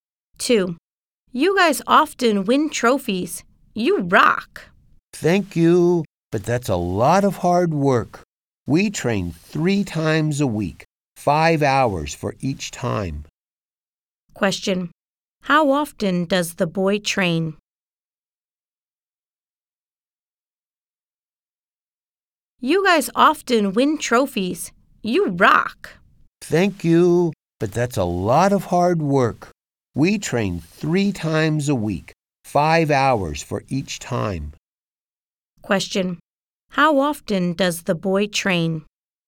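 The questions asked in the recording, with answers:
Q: How often does the boy train?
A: Three times a week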